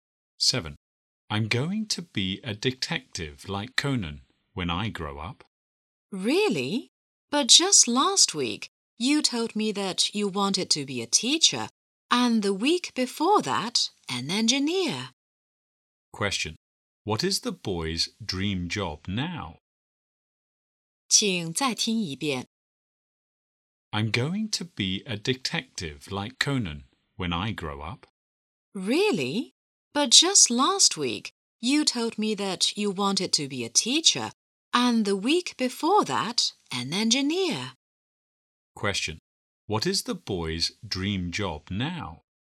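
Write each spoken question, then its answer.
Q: What is the boy's dream job now?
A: A detective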